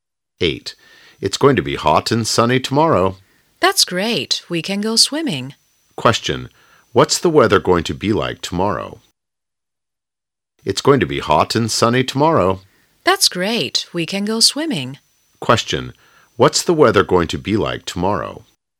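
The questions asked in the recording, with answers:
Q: Question. What's the weather going to be like tomorrow?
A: Hot and sunny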